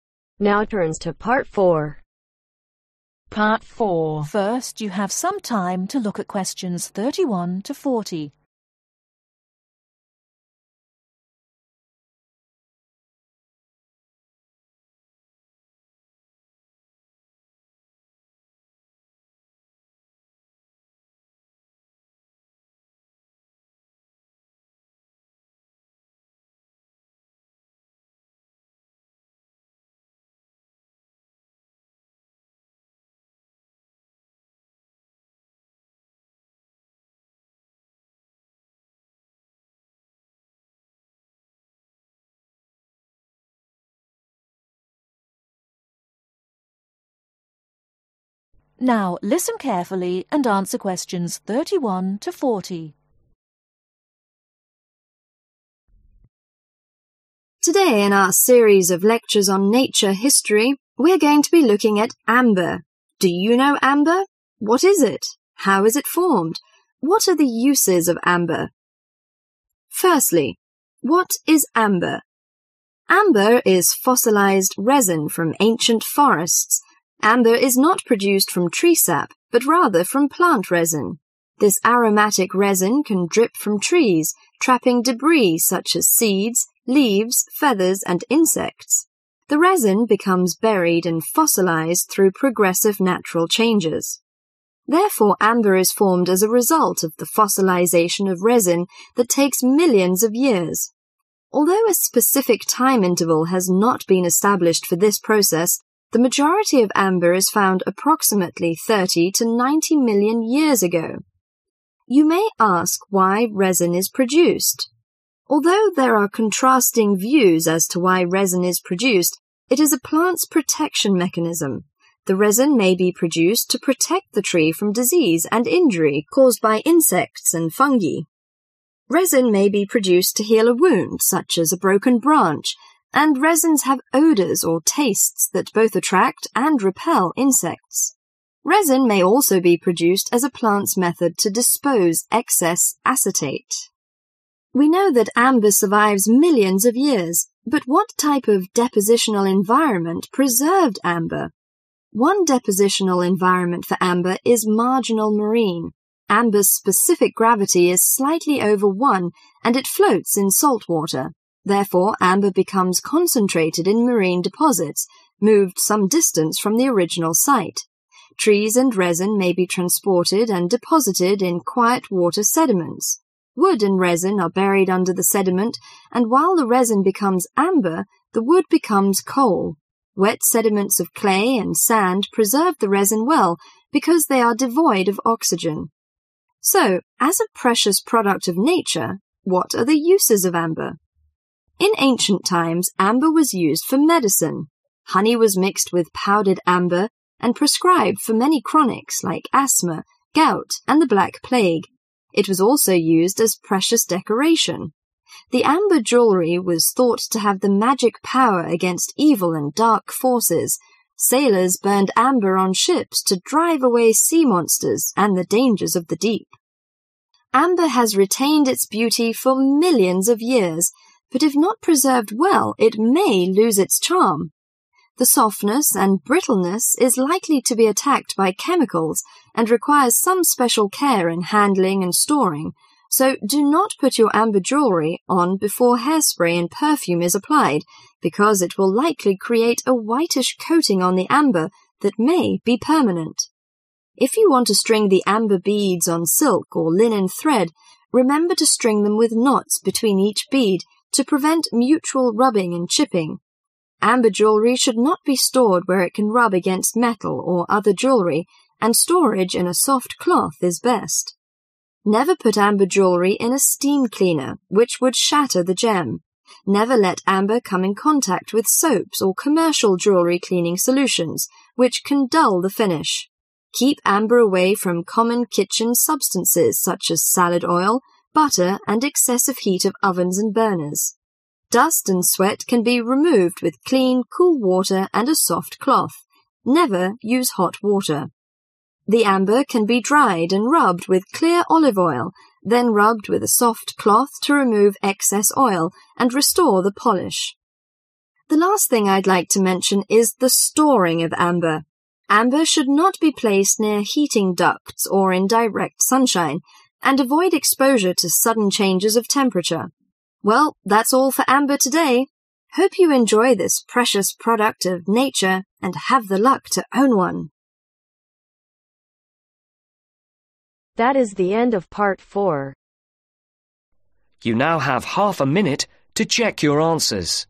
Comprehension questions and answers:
Complete the summary below. Write ONE WORD ONLY for each answer.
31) It is a kind of (31)............ resin, trapping debris like seeds and insects.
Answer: Fossilized

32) The majority of amber was formed about 30-90 (32)............ years ago.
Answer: Million

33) To protect tress from (33)............ and injury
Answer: Disease

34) To (34)............ excess acetate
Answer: Dispose

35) Trees and resin were (35)............ and deposited in quiet water sediments.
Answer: Transported

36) Used as medicine for chronica and precious (36)............ .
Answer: Decoration

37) (37)............ may attack the softness and brittleness of amber.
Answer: Chemicals

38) When stringing amber beads, do leave (38)............ between each bead.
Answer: Knot

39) Remove dust and sweat with (39)............ and (40)............ water and soft cloth.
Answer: Clean

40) Remove dust and sweat with (39)............ and (40)............ water and soft cloth.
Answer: Cool